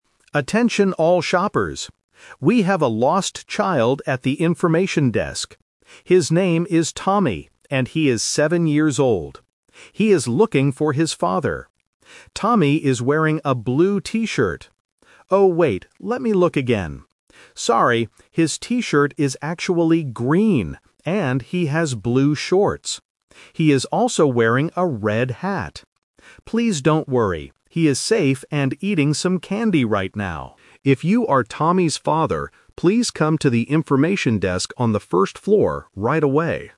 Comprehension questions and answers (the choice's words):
A security guard is making an announcement over the PA system about a lost boy. Listen to the announcement and choose the correct answer (A, B, or C) for each question.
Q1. What color is Tommy's T-shirt?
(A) Blue.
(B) Green.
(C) Red.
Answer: Green.

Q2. Who is Tommy looking for?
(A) His mother.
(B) His grandfather.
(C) His father.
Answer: His father.

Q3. Where should Tommy's father go to find him?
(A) The information desk.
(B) The toy section.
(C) The front door.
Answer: The information desk.

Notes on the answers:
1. This is "The Twist" (Correction). The announcer first says Tommy is wearing a blue T-shirt, but then corrects himself: "Sorry, his T-shirt is actually green..." Why the trap is wrong: Option (A) is the trap because it was the announcer's first mistake. Option (C) is a trap using the color of Tommy's hat (a red hat).
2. The announcer clearly states, "He is looking for his father" and later says "If you are Tommy's father..." Why the trap is wrong: Option (A) is a very common trap. When hearing about a lost child, people usually assume the child wants their mother, but the audio specifically says "father". Option (B) is not mentioned.
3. The announcer tells the father to "please come to the information desk on the first floor right away." Why the trap is wrong: Option (B) is a plausible place for a child to be in a store, but he is not there now. Option (C) is a plausible meeting point but is never mentioned.

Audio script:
We have a lost child at the information desk. His name is Tommy, and he is seven years old. He is looking for his father. Tommy is wearing a blue T-shirt... Oh, wait, let me look again. Sorry, his T-shirt is actually green, and he has blue shorts. He is also wearing a red hat. Please don't worry, he is safe and eating some candy right now. If you are Tommy's father, please come to the information desk on the first floor right away.